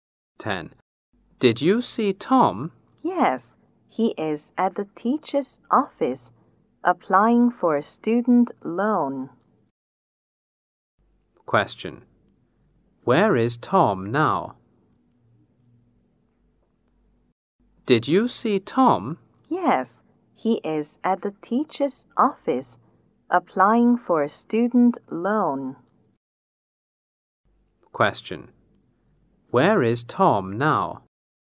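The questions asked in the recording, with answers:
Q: Where is Tom now?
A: At the teacher's office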